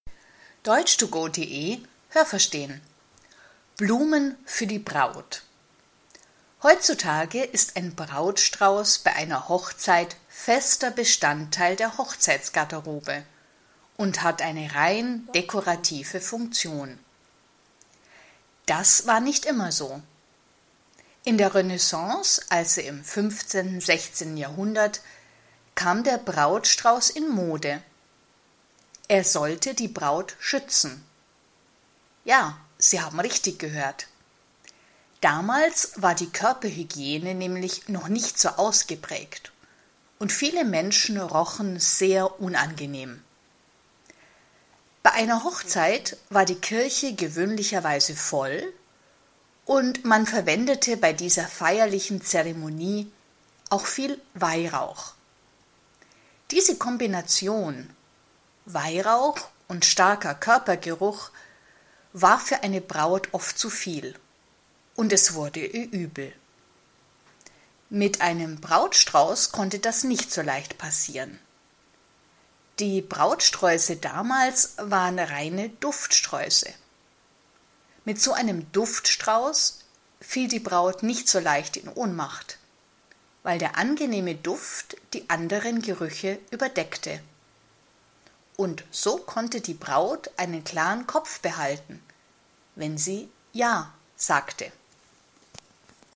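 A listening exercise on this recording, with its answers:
Haben Sie das gehört? Stimmt diese Aussage?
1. Ein Brautstrauß hatte immer nur eine dekorative Funktion.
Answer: Nein, das habe ich nicht gehört.

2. Der Brautstrauß kam schon vor dem 15. Jahrhundert in Mode.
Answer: Nein, das habe ich nicht gehört.

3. Ein Brautstrauß sollte die Braut ursprünglich vor Ausdünstungen ihrer Mitmenschen schützen.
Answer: Ja, das habe ich gehört.

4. Im 15./16. Jahrhundert rochen viele Menschen schlecht, weil sie zu viel Parfüm benutzten.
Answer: Nein, das habe ich nicht gehört.

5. Im 15./16. Jahrhundert wurde in den Kirchen viel geraucht.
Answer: Nein, das habe ich nicht gehört.

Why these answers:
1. Er hat heute eine dekorative Funktion. Aber das war nicht immer so.
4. Sie rochen schlecht, weil die Körperhygiene noch nicht so weit entwickelt war.
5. Es wurde viel Weihrauch verwendet. (Weihrauch = aromatischer Duft, den man bei religiösen Handlungen verwendet)

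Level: B1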